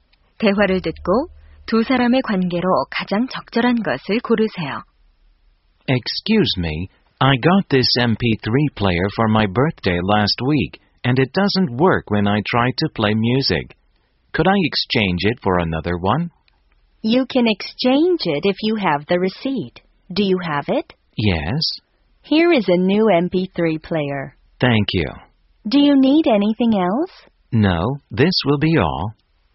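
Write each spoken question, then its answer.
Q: 대화를 듣고 두 사람의 관계로 가장 적절한 것을 고르세요.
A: 점원과 손님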